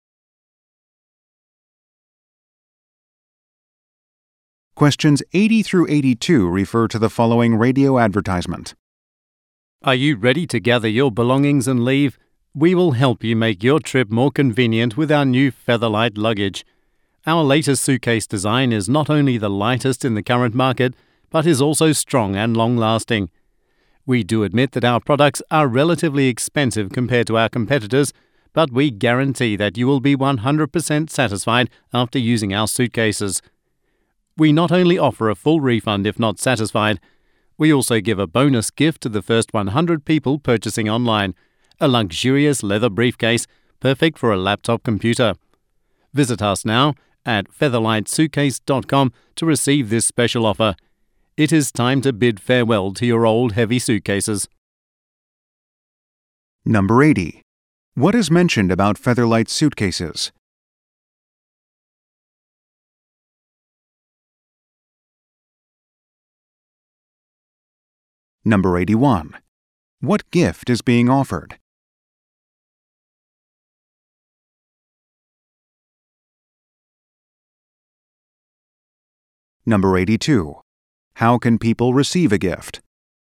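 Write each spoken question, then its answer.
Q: What is mentioned about Featherlight suitcases?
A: They are the lightest on the market

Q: What gift is being offered?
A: A leather briefcase

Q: How can people receive a gift?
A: By being among the first 100 to buy online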